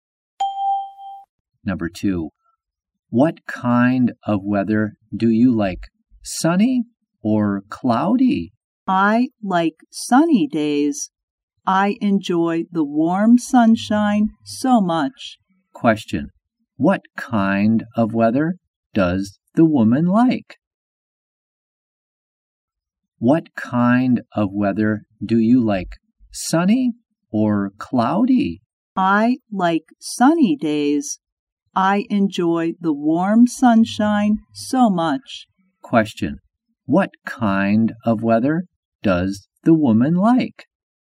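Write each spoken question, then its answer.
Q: Question, what kind of weather does the woman like?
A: Sunny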